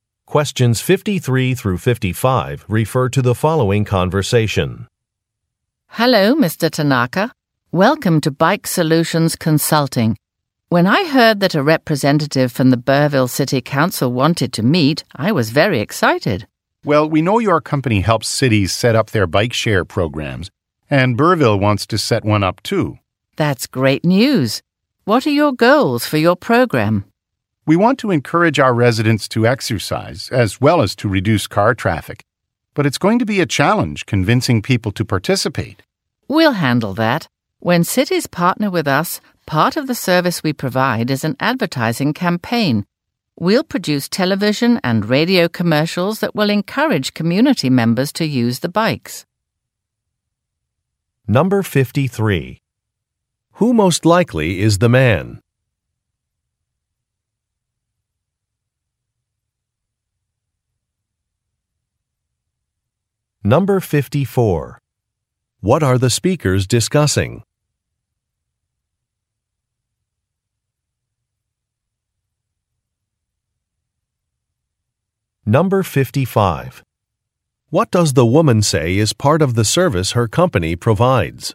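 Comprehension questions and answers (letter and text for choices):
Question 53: Who most likely is the man?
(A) A professional athlete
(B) A store manager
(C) A city official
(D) A television producer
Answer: (C) A city official

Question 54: What are the speakers discussing?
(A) A health and fitness show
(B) A workplace volunteer event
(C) A road-repair initiative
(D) A bicycle-sharing program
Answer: (D) A bicycle-sharing program

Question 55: What does the woman say is part of the service her company provides?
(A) Wellness screening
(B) Local advertising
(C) Product samples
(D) Event tickets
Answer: (B) Local advertising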